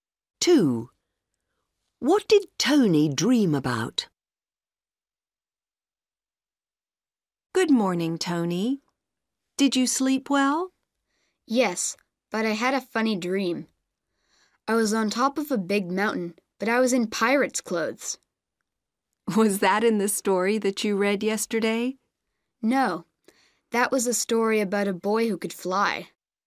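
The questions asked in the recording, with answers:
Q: What did Tony dream about?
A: Being on top of a big mountain in pirate's clothes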